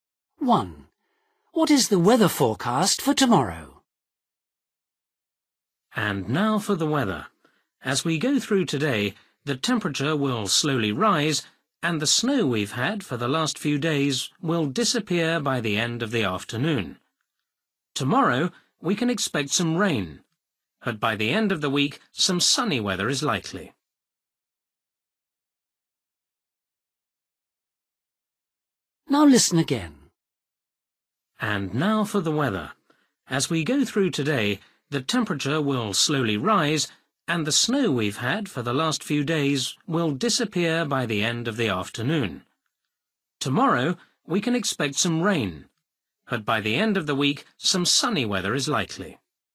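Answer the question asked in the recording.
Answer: Rain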